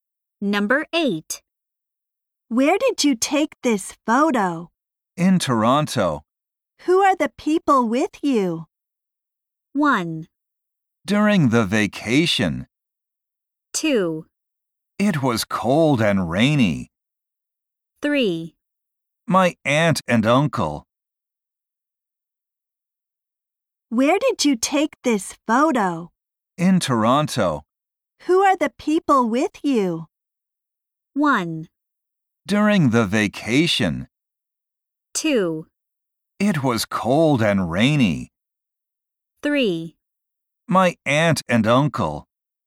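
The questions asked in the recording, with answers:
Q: Who are the people with you?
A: 3: My aunt and uncle.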